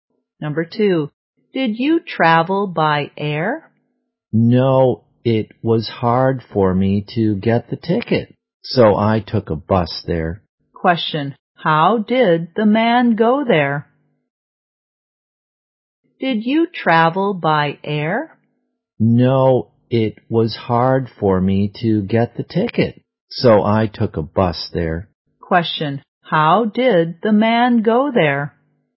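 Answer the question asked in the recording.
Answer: By bus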